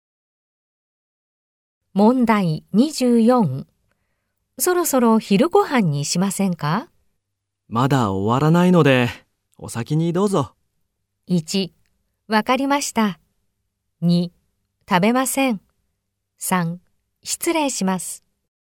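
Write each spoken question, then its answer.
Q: そろそろ昼ご飯にしませんか?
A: 1: わかりました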